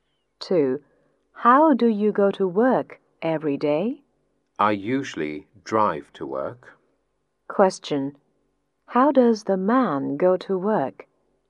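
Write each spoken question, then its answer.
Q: How does the man go to work?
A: He drives to work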